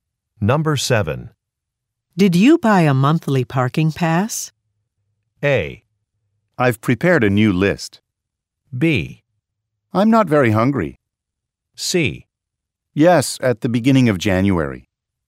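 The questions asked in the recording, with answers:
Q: Did you buy a monthly parking pass?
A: C: Yes, at the beginning of January.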